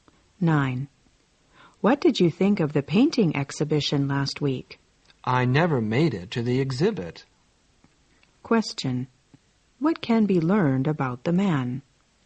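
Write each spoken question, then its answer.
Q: What can be learned about the man?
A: He didn't go to the exhibition.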